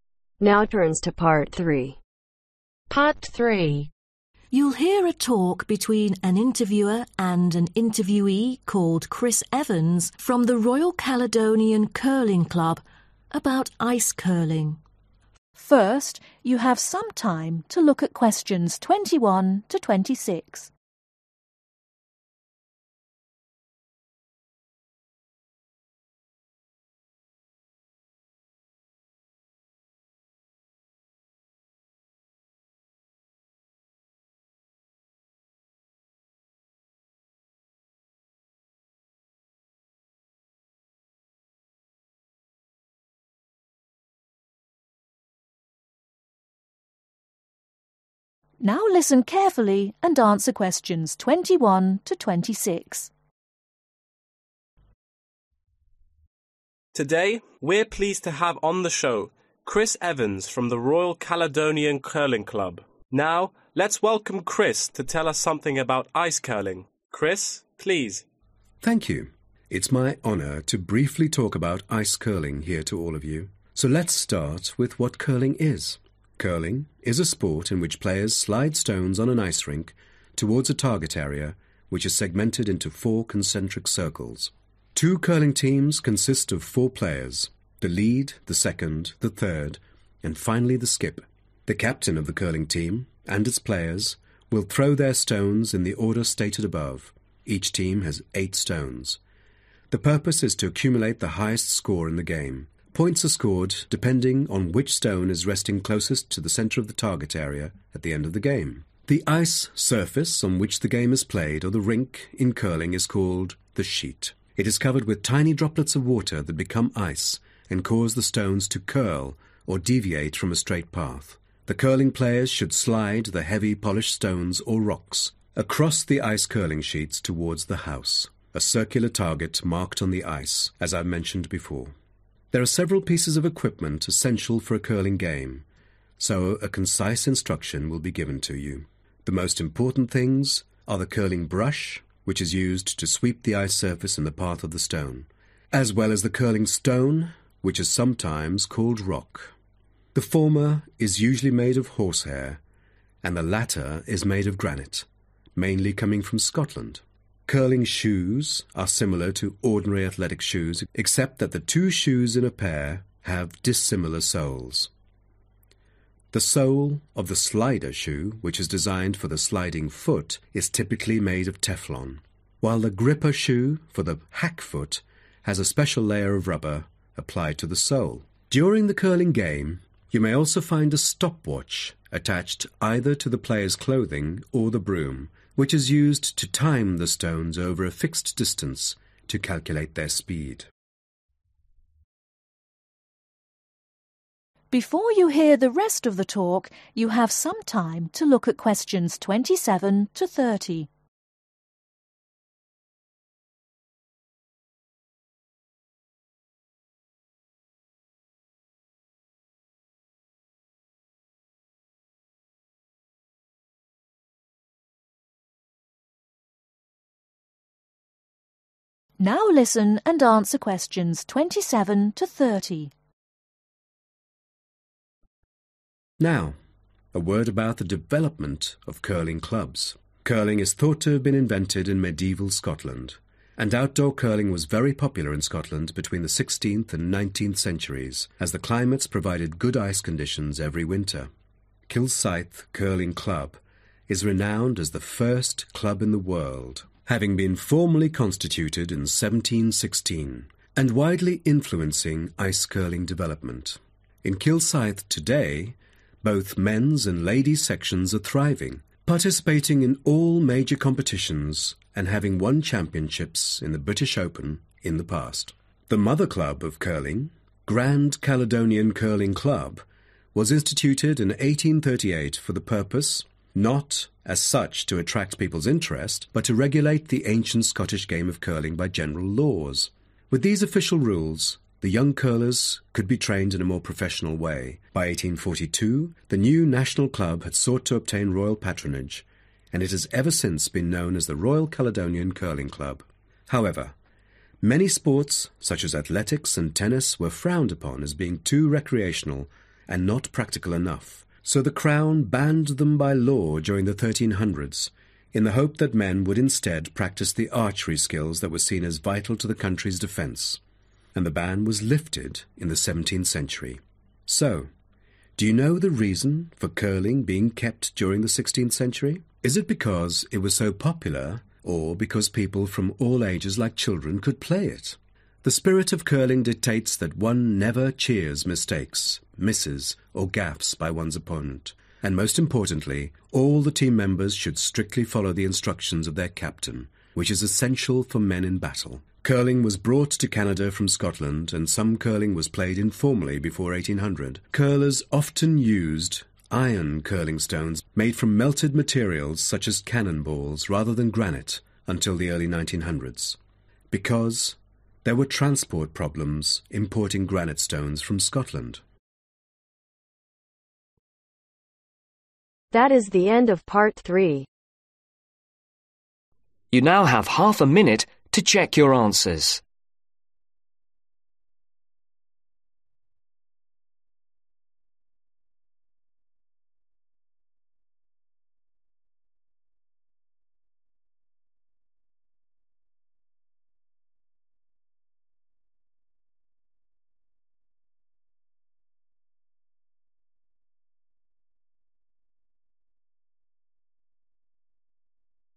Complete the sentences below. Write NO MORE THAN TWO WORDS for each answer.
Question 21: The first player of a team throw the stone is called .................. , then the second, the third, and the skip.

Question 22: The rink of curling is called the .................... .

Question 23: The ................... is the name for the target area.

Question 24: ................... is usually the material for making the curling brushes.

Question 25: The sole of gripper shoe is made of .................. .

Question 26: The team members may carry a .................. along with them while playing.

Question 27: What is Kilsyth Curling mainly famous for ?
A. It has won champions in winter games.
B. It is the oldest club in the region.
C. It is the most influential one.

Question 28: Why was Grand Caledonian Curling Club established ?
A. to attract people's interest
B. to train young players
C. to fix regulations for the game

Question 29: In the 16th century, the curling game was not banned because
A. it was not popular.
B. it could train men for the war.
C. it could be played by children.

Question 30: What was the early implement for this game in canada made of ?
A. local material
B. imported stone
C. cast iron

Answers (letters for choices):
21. the lead
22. sheet
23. house
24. horse hair
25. rubber
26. stop watch
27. B
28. C
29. B
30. C